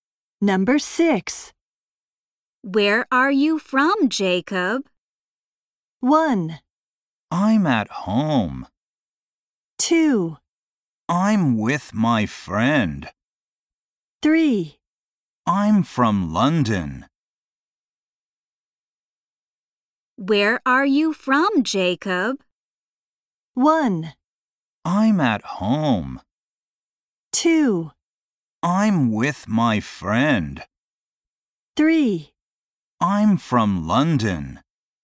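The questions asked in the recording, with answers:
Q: Where are you from, Jacob?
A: 3: I'm from London.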